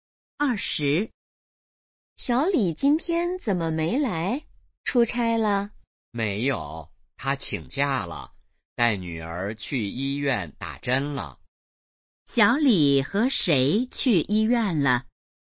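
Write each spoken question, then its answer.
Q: 小李和谁去医院了?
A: 女儿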